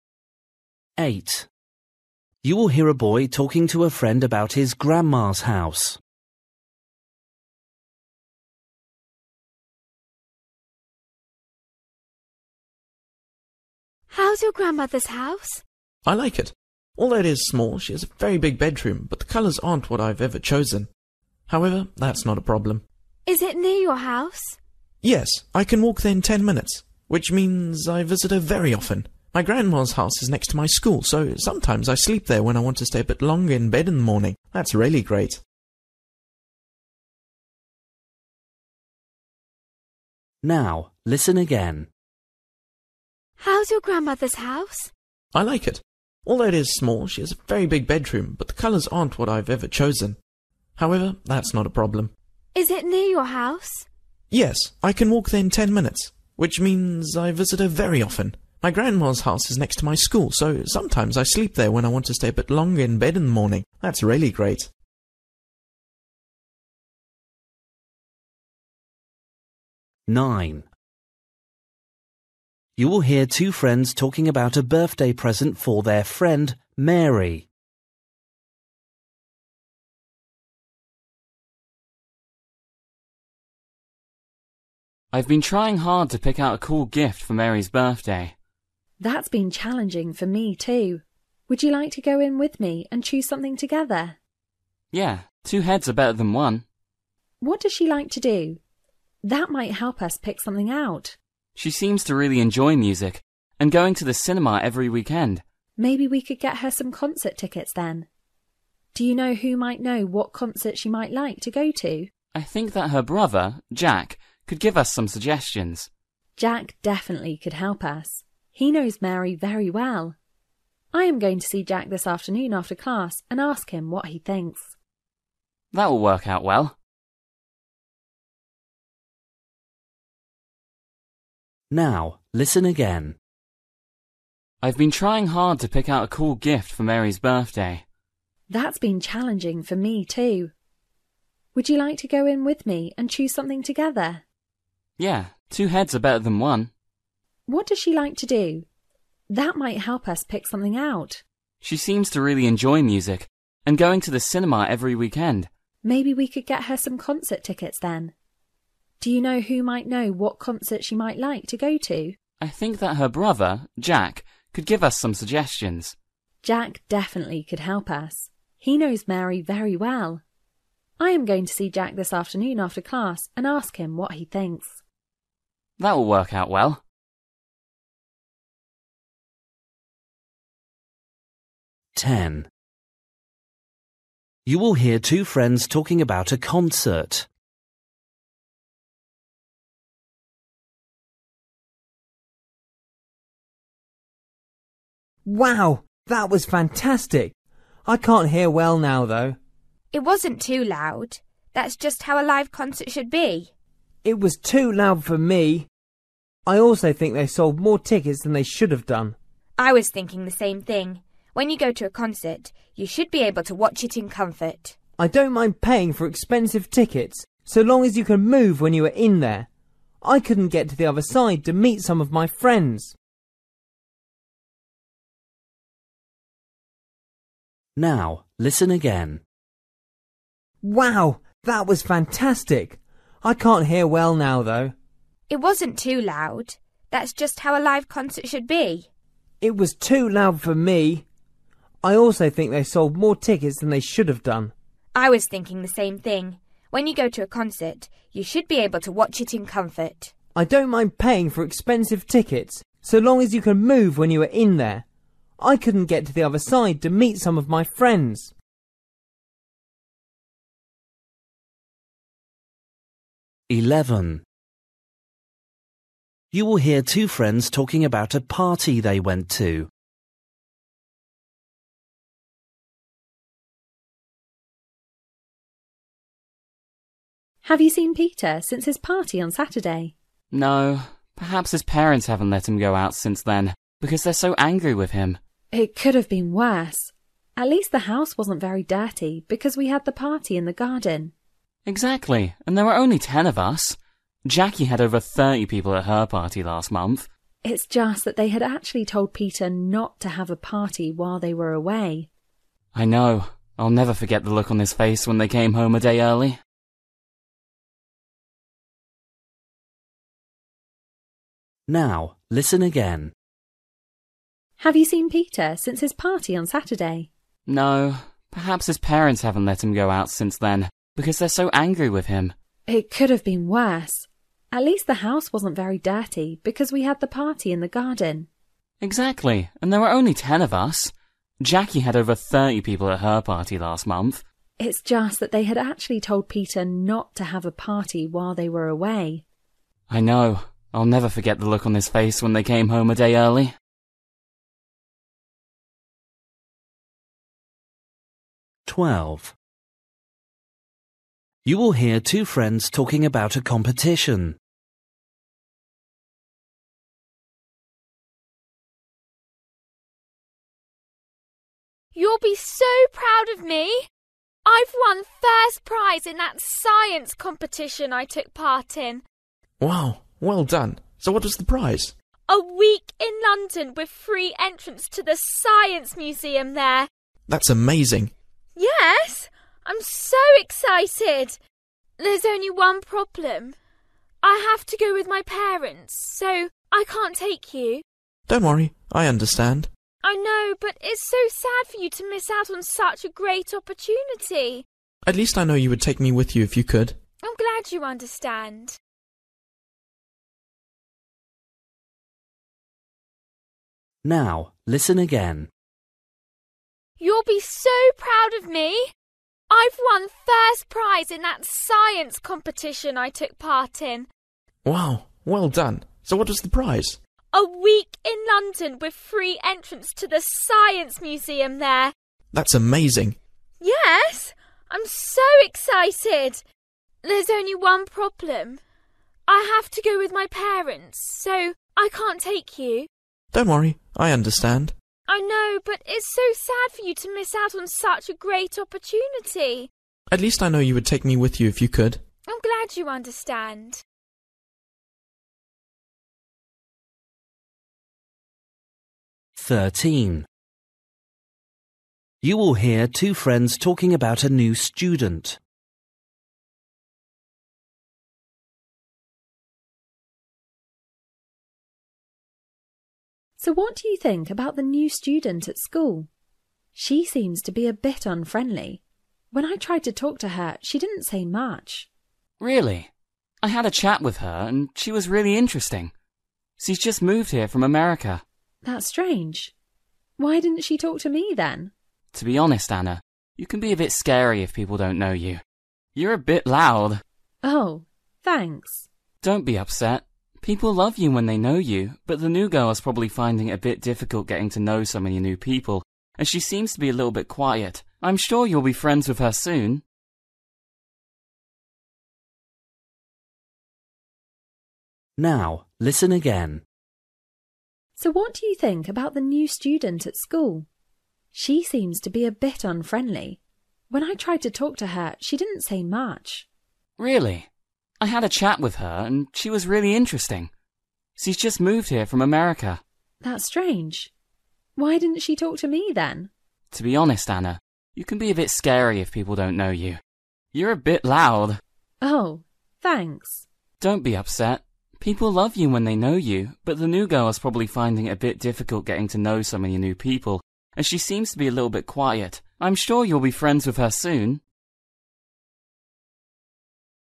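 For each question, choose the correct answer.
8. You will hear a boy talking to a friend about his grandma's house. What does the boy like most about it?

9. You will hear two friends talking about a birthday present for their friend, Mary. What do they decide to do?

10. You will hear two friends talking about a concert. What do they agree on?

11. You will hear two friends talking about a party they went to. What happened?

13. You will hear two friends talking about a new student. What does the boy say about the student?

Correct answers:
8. It is next to his school, so he can sleep there and stay in bed longer.
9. Ask Mary's brother Jack for suggestions about concert tickets.
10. Too many tickets were sold, so it was too crowded.
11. Peter's parents came home a day early and found he had had a party.
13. She is interesting but a little quiet.

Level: Luyện nghe trình độ B1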